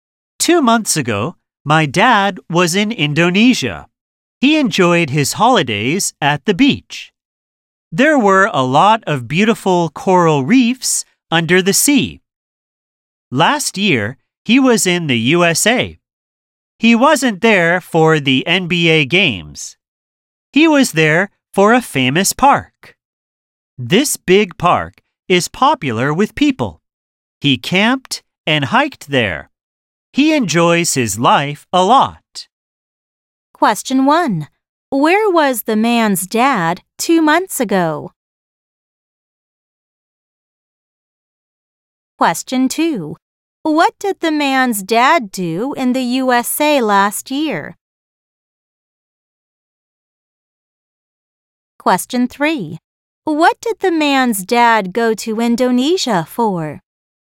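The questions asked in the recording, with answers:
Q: Where was the man's dad 2 months ago?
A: In Indonesia

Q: What did the man's dad do in the USA last year?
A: He camped and hiked in a famous park

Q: What did the man's dad go to Indonesia for?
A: For holidays at the beach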